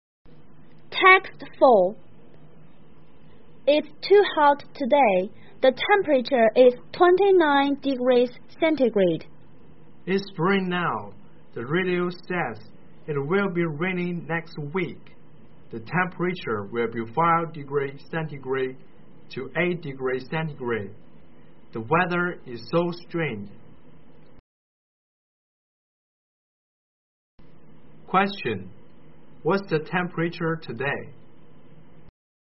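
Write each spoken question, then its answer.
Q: What's the temperature today?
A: 29 degrees centigrade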